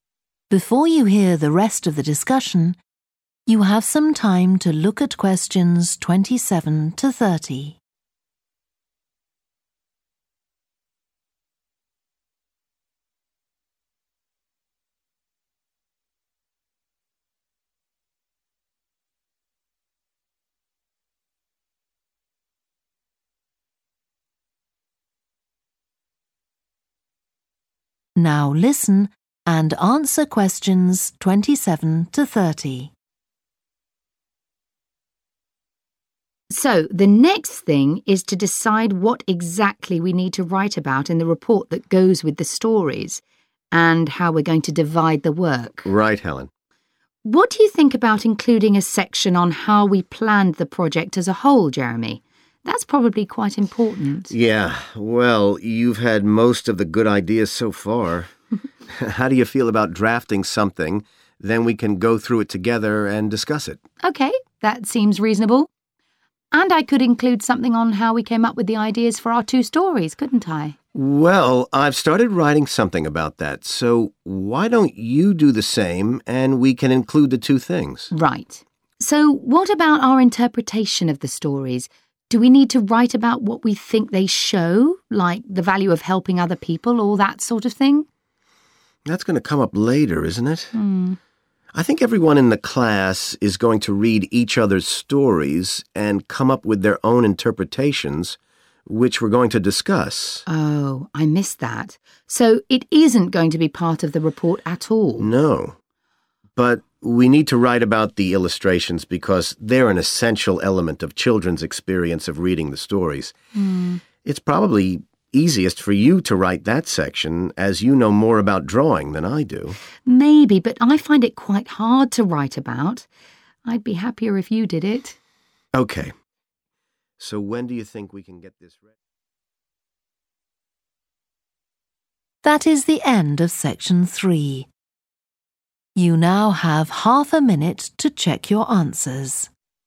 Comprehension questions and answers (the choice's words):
Who is going to write each of the following parts of the report? Write the correct letter, A-D, next to Questions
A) Helen only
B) Jeremy only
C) both Helen and Jeremy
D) neither Helen nor Jeremy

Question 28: how they had ideas for their stories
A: both Helen and Jeremy

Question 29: an interpretation of their stories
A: neither Helen nor Jeremy

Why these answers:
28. The correct answer is C because the excerpt suggests that both Helen and Jeremy will be involved in writing about their story ideas, as they are both encouraged to do so in the conversation.
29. The correct answer is D because the excerpt shows that it will be the students in the class, not Helen or Jeremy, who will come up with their own interpretations of the stories.

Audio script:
HELEN: Mm, I see what you mean. I'll have another go at that.
JEREMY: And I like the wool hats they're wearing. Maybe you could give each of them a scarf as well.
HELEN: Yeah, that's easy enough. They can be streaming out behind the people to suggest they're skating really fast.
JEREMY: Mm, great. Well that's all on the drawings.
HELEN: Right. So you've finished writing your story and I just need to finish illustrating it, and my story and your drawings are done.
HELEN: So the next thing is to decide what exactly we need to write about in the report that goes with the stories, and how we're going to divide the work.
JEREMY: Right, Helen.
HELEN: What do you think about including a section on how we planned the project as a whole, Jeremy? That's probably quite important.
JEREMY: Yeah. Well, you've had most of the good ideas so far. How do you feel about drafting something, then we can go through it together and discuss it?
HELEN: OK, that seems reasonable. And I could include something on how we came up with the ideas for our two stories, couldn't I?
JEREMY: Well, I've started writing something about that, so why don't you do the same and we can include the two things.
HELEN: Right. So what about our interpretation of the stories? Do we need to write about what we think they show, like the value of helping other people, all that sort of thing?
JEREMY: That's going to come up later isn't it? I think everyone in the class is going to read each other's stories and come up with their own interpretations which we're going to discuss.
HELEN: Oh, I missed that. So it isn't going to be part of the report at all?
JEREMY: No. But we need to write about the illustrations, because they're an essential element of children's experience of reading the stories. It's probably easiest for you to write that section, as you know more about drawing than I do.
HELEN: Maybe, but I find it quite hard to write about. I'd be happier if you did it.
JEREMY: OK. So when do you think ...